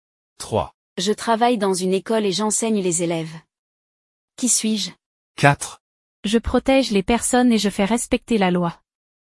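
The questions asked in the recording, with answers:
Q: Qui suis-je?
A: professeur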